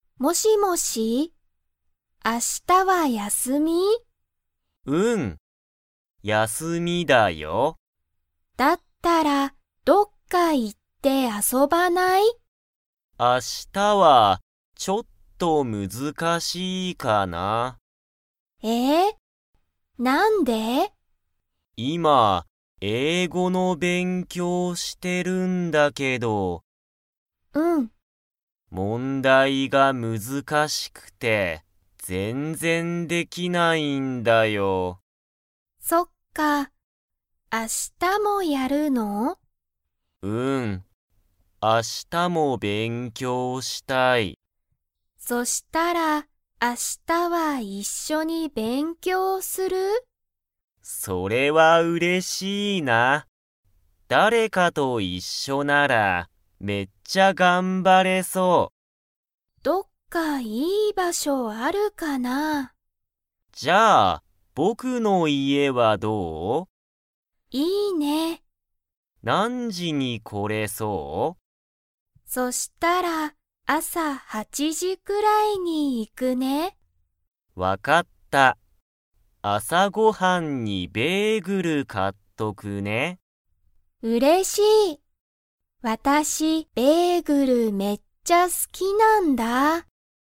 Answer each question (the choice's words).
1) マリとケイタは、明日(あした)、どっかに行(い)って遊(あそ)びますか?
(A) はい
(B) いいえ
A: いいえ

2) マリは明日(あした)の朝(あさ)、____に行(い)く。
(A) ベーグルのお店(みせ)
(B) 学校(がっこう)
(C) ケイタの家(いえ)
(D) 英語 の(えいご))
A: ケイタの家(いえ)

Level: Level 2